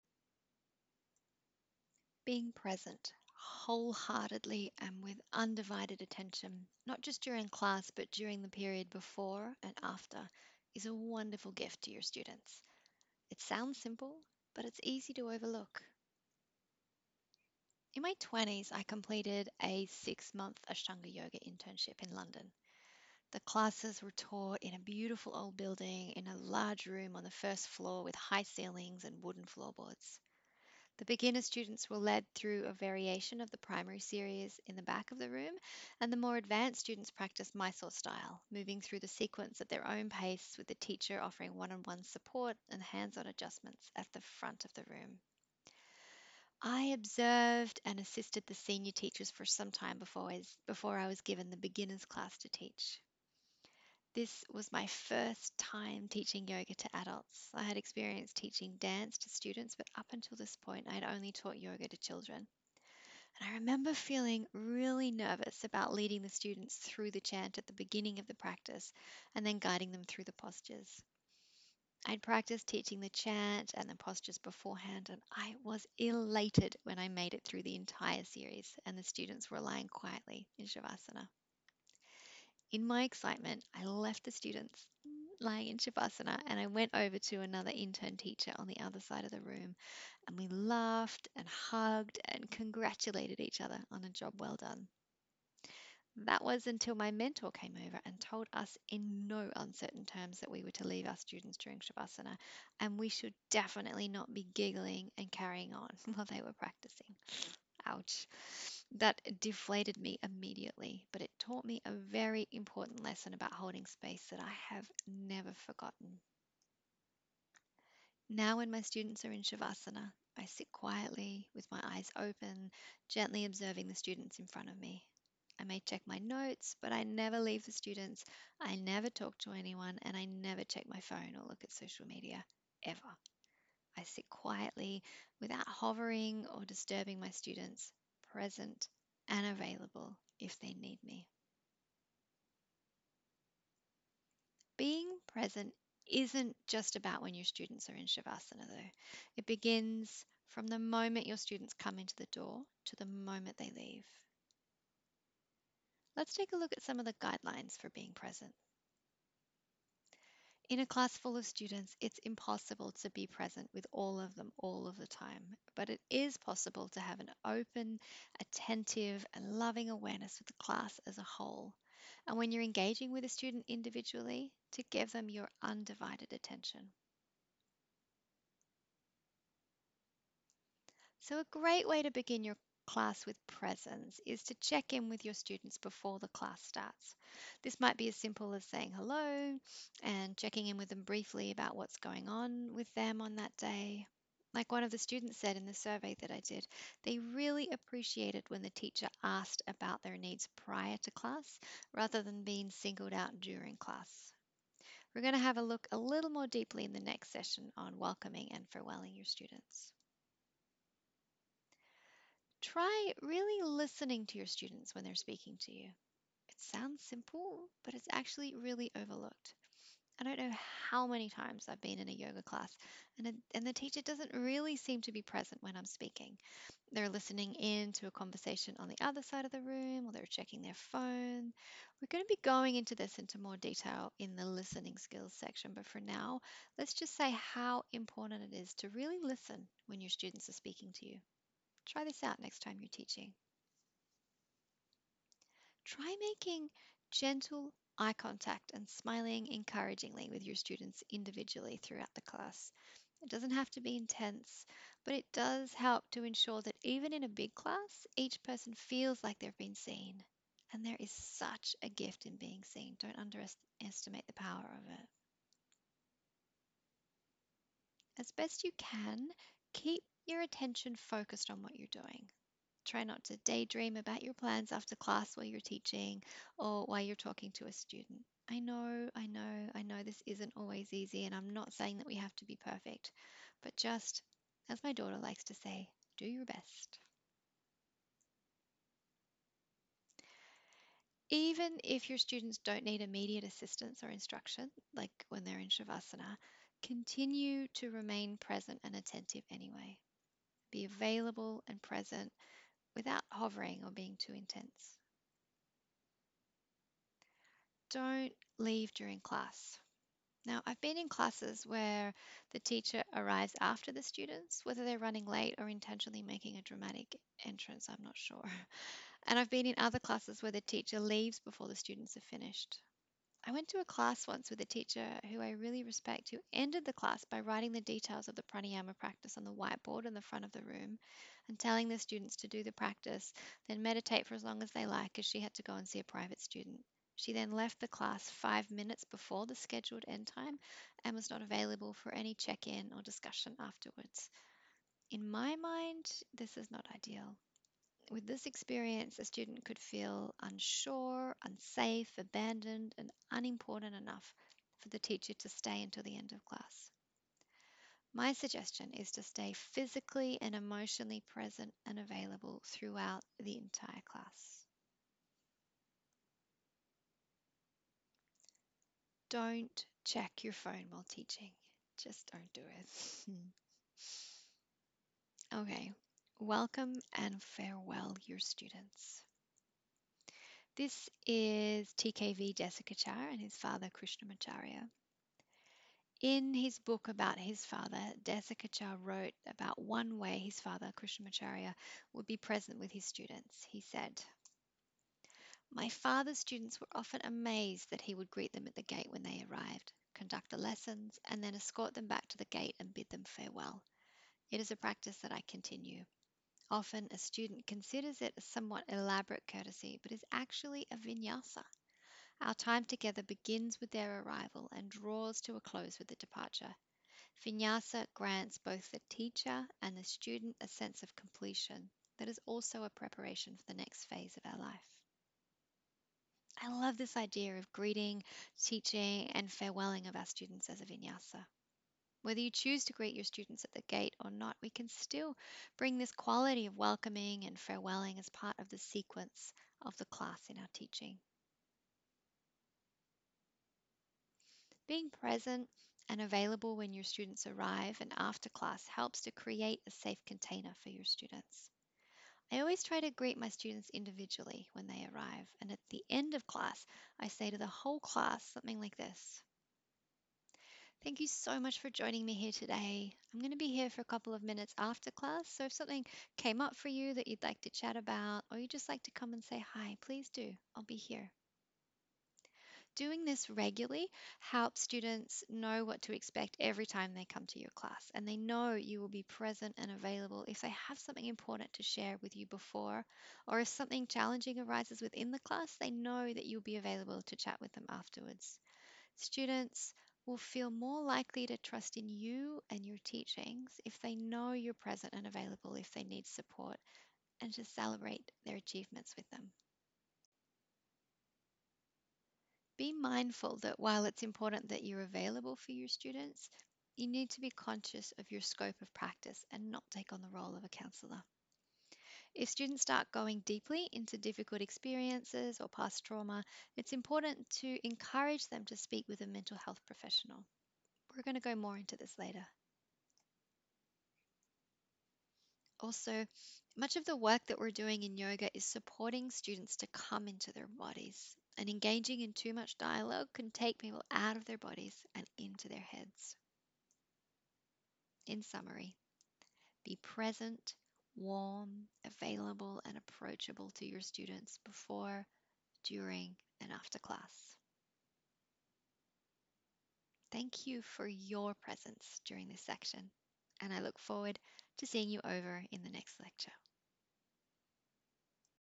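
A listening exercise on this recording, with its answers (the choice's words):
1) When do you need to be present with your students?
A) Only when your students can see you (it's ok to switch off when they're in savasana).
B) From the moment your students come in the door to the moment they leave.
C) There's no real need to be present when teaching yoga if you're aligned with your higher self.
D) All of the above.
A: From the moment your students come in the door to the moment they leave.

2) How can you be present with your students in a large class?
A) By bringing an open, attentive and loving awareness to the class as a whole, and offering undivided attention to individual students when you can.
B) You can't.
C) By speaking really loudly.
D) None of the above.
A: By bringing an open, attentive and loving awareness to the class as a whole, and offering undivided attention to individual students when you can.

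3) What are some ways to be present with your students?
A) Check in with your students before the class starts.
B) Really listen when students speak to you.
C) Keep your attention focused on what you're doing.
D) All of the above.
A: All of the above.

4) If students don't need your immediate assistance, what could you do?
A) Hover over them to make sure they're ok.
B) Close your eyes and do your own meditation practice.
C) Remain available, present and attentive.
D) All of the above.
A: Remain available, present and attentive.

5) When is it ok to check your social media updates during class?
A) When students are in savasana and can't see what you're doing.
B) When the students are holding a pose for a long time, and they don't need your immediate support.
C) When your phone is on silent.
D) None of the above.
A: None of the above.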